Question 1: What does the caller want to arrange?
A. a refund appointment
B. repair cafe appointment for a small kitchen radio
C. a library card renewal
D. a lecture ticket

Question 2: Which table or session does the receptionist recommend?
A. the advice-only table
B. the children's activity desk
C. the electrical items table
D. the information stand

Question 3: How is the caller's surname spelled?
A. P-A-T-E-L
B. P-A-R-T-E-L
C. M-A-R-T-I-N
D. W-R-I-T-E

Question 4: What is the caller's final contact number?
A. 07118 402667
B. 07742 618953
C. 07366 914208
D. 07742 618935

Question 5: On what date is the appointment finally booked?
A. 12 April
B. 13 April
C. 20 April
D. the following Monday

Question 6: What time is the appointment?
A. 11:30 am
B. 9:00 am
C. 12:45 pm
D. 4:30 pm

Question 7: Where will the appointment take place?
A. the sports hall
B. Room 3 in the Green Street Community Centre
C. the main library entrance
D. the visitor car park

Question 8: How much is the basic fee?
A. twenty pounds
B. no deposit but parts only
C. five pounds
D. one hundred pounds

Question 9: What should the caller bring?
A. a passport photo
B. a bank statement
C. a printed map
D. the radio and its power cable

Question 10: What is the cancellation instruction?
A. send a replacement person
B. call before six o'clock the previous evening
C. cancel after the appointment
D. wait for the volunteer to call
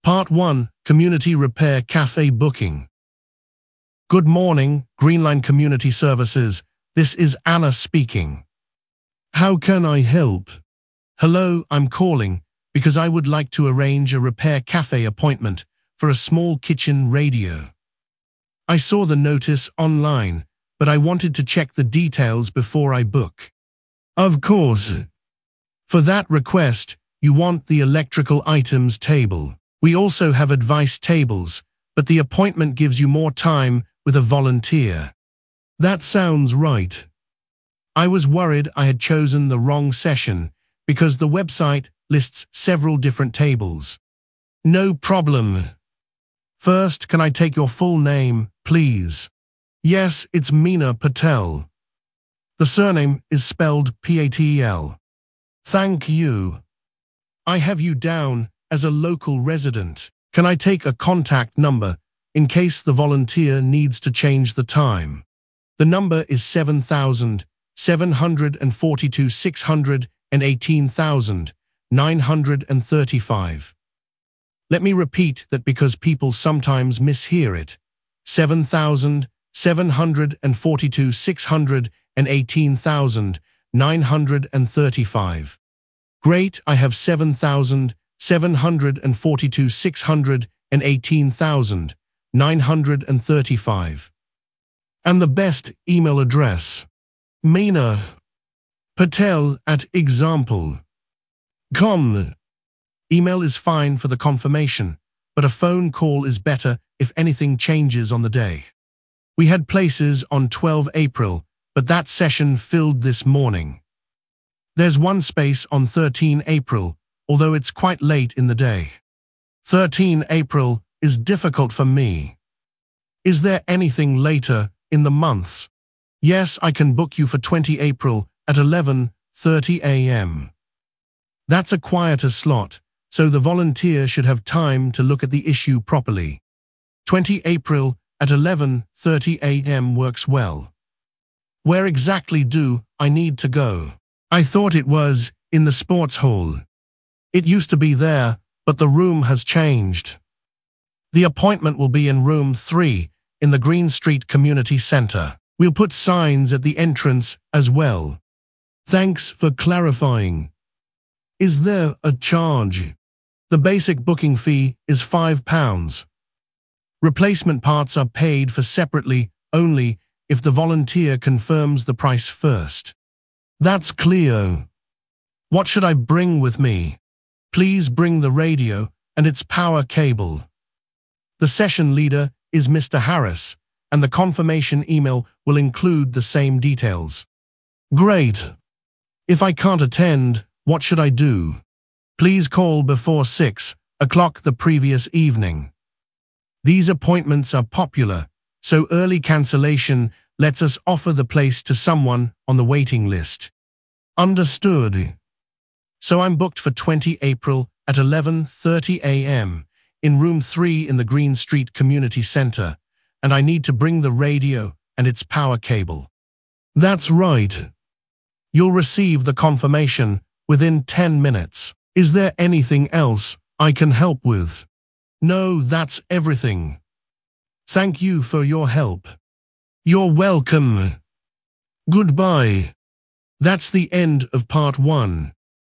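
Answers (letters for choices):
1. B
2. C
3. A
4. D
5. C
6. A
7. B
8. C
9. D
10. B

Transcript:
Part 1: Community Repair Cafe Booking
Receptionist: Good morning, Greenline Community Services, this is Anna speaking. How can I help?
Caller: Hello, I am calling because I would like to arrange a repair cafe appointment for a small kitchen radio. I saw the notice online, but I wanted to check the details before I book.
Receptionist: Of course. For that request, you want the electrical items table. We also have advice tables, but the appointment gives you more time with a volunteer.
Caller: That sounds right. I was worried I had chosen the wrong session because the website lists several different tables.
Receptionist: No problem. First, can I take your full name, please?
Caller: Yes, it is Mina Patel. The surname is spelled P-A-T-E-L.
Receptionist: Thank you. I have you down as a local resident. 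Can I take a contact number in case the volunteer needs to change the time?
Caller: The number is 07742 618935. Let me repeat that because people sometimes mishear it: 07742 618935.
Receptionist: Great, I have 07742 618935. And the best email address?
Caller: mina.patel@example.com. Email is fine for the confirmation, but a phone call is better if anything changes on the day.
Receptionist: We had places on 12 April, but that session filled this morning. There is one space on 13 April, although it is quite late in the day.
Caller: 13 April is difficult for me. Is there anything later in the month?
Receptionist: Yes, I can book you for 20 April at 11:30 am. That is a quieter slot, so the volunteer should have time to look at the issue properly.
Where exactly do I need to go? I thought it was in the sports hall.
Receptionist: It used to be there, but the room has changed. The appointment will be in Room 3 in the Green Street Community Centre. 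We will put signs at the entrance as well.
Caller: Thanks for clarifying. Is there a charge?
Receptionist: The basic booking fee is five pounds. Replacement parts are paid for separately only if the volunteer confirms the price first.
Caller: That is clear. What should I bring with me?
Receptionist: Please bring the radio and its power cable. The session leader is Mr. Harris, and the confirmation email will include the same details.
Caller: Great. If I cannot attend, what should I do?
Receptionist: Please call before six o'clock the previous evening. These appointments are popular, so early cancellation lets us offer the place to someone on the waiting list.
Caller: Understood.
Is there anything else I can help with?
Caller: No, that is everything. Thank you for your help.
Receptionist: You are welcome. Goodbye.
Part 2: Riverside Eco-Park Open Day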